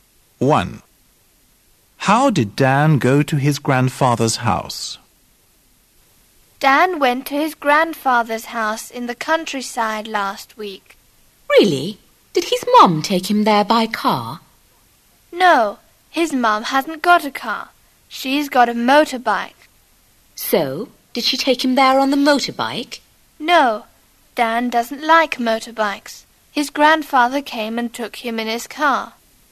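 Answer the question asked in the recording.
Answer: By car (his grandfather's)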